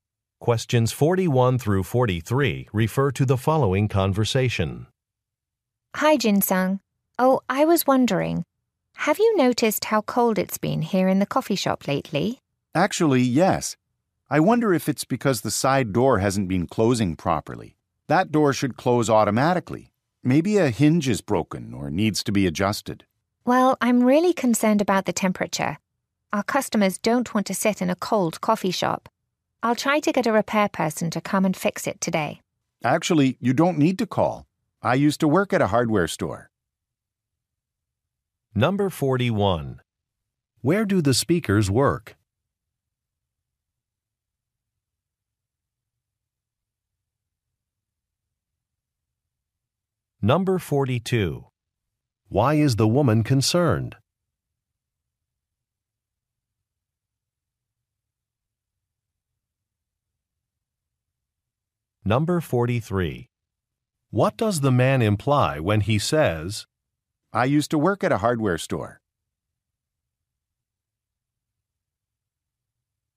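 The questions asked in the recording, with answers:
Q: Where do the speakers work?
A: At a coffee shop

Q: Why is the woman concerned?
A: Customers will be uncomfortable because it is cold

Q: What does the man imply when he says,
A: He can fix the door himself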